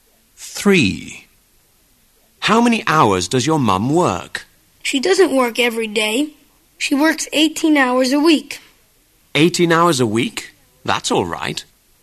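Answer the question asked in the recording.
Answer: 18 hours a week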